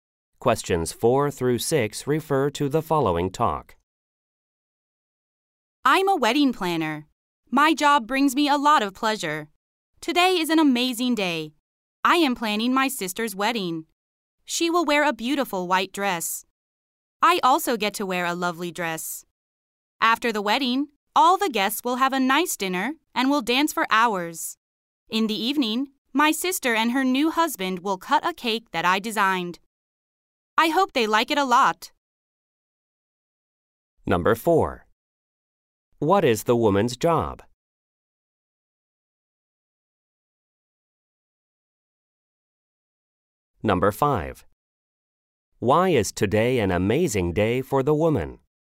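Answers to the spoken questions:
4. Wedding planner
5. She is planning her sister's wedding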